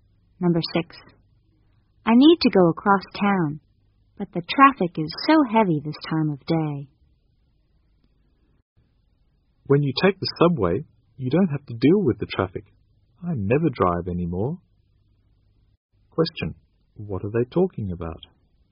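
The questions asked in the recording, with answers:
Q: What are they talking about?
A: How to get across town without facing heavy traffic.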